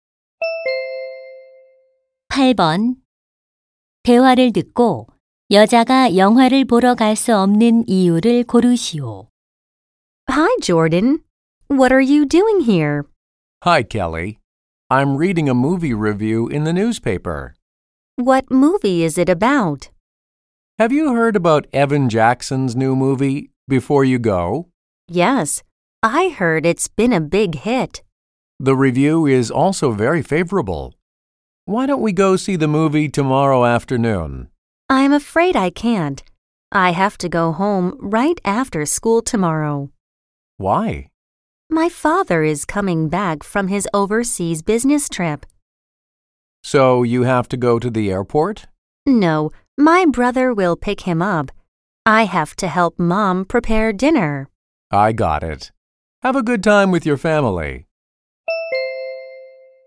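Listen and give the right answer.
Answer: 엄마가 저녁 준비하는 것을 도와야 해서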